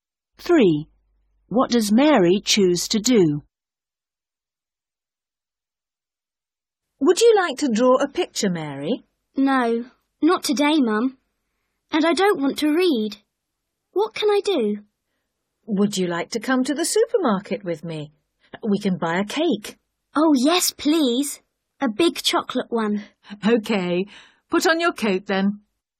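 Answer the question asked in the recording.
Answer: Go to the supermarket with Mum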